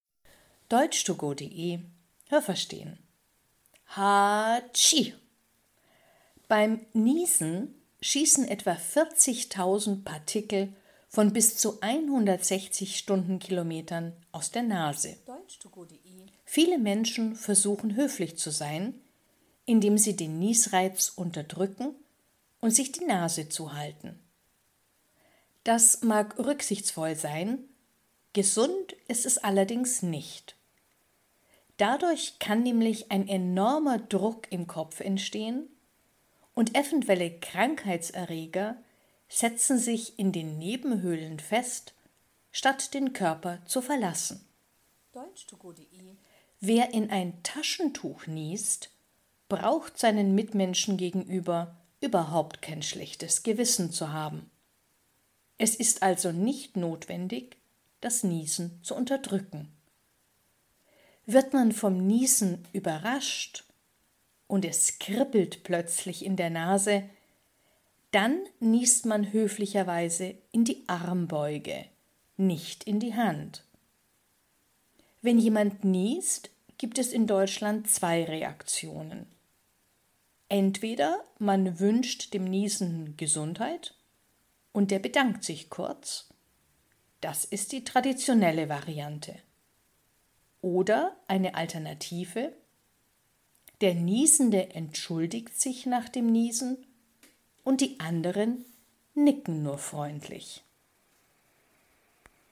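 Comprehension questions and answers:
Was haben Sie gehört? Es gibt nur eine korrekte Antwort.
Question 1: Beim Niesen entweicht die Luft mit einer Höchstgeschwindigkeit von ...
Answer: 160 Stundenkilometern

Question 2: Es ist _____ , sich beim Niesen die Nase zuzuhalten.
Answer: nicht gesund

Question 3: Wenn man das Niesen unterdrückt, dann ...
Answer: kann ein enormer Druck im Kopf entstehen und Krankheitserreger setzen sich in den Nebenhöhlen fest

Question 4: Wenn man in ein Taschentuch niest, dann ...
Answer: braucht man kein schlechtes Gewissen zu haben

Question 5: Hat man kein Taschentuch zur Verfügung, dann niest man ...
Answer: in die Armbeuge

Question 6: Wenn Sie hören, dass jemand niest, dann können Sie ...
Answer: ihm Gesundheit wünschen oder nur freundlich nicken

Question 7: Wenn Sie selbst niesen, dann ...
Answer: bedanken Sie sich kurz oder entschuldigen sich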